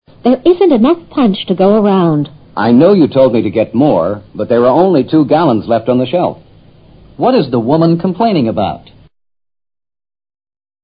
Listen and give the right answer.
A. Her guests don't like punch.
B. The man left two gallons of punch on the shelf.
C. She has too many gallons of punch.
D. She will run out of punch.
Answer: D. She will run out of punch.

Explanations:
There isn't enough punch to go around 意思是饮料不够大家喝。答案she will run out of punch与原句中的话是一致的。run out: 用尽、用完。punch 是以果汁,香料,茶、酒等搀和的混合甜饮料。gallon : 加仑。